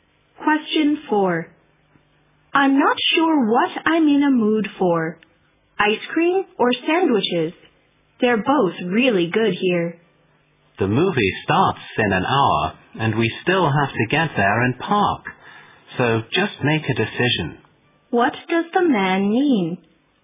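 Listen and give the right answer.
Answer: The woman should decide quickly because they are short of time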